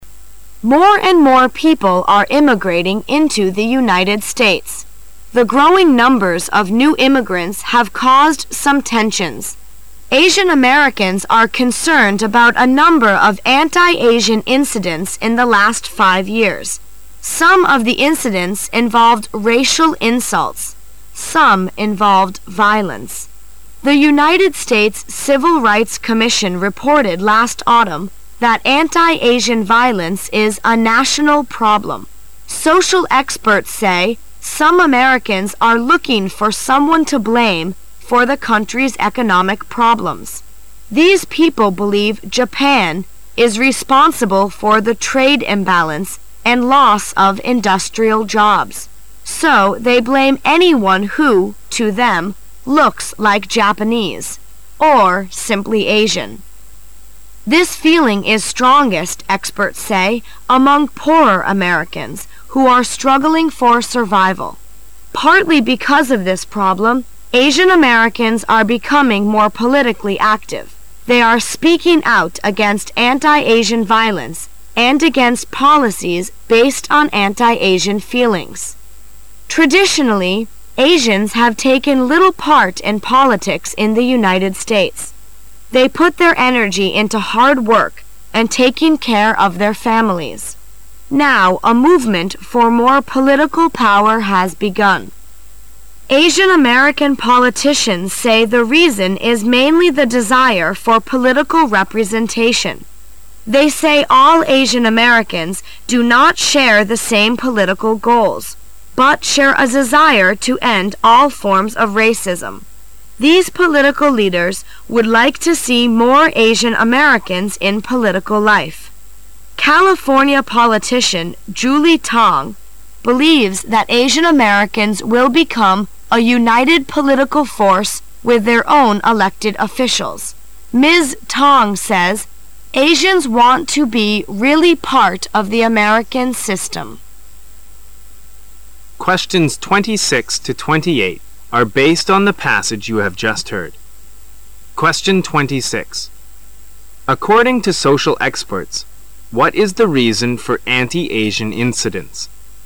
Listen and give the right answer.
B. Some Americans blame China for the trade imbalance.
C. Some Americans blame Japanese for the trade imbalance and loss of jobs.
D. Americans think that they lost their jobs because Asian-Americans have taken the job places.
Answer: C. Some Americans blame Japanese for the trade imbalance and loss of jobs.

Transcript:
[解析] 26-28 More and more people are immigrating into the United States. The growing numbers of new immigrants have caused some tensions. Asian-Americans are concerned about a number of anti Asian incidents in the last five years. Some of the incidents involved racial insults. Some involved violence. The United States Civil Rights Commission reported last autumn that anti-Asian violence is a national problem. Social experts say some Americans are looking for someone to blame for the country's economic problems. These people believe Japan is responsible for the trade imbalance and loss of industrial jobs. So they blame anyone who, to them, looks like Japanese... or simply Asian. This feeling is strongest, experts say, among poorer Americans who are struggling for survival. Partly because of this problem, Asian-Americans are becoming more politically active. They are speaking out against anti-Asian violence and against policies based on anti-Asian feelings. Traditionally, Asians have taken little part in politics in the United States. They put their energy into hard work and taking care of their families. Now, a movement for more political power has begun. Asian-American politicians say the reason is mainly the desire for political representation. They say all Asian Americans do not share the same political goals, but share a desire to end all forms of racism. These political leaders would like to see more Asian-Americans in political life. California politician Jule Tang believes that Asian-Americans will become a united political force with their own elected officials. Ms. Tang says, "Asians want to be really part of the American system." 26.According to social experts,what is the reason for anti-Asian incidents?